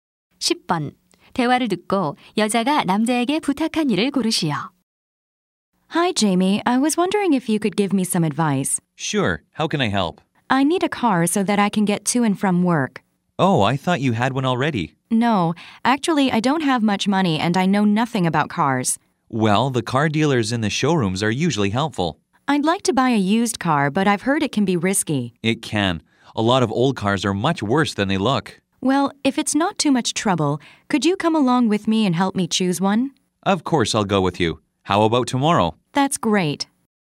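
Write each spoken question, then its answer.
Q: 대화를 듣고 여자가 남자에게 부탁한 일을 고르시오.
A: 중고차 고르는 것을 같이 가서 도와주기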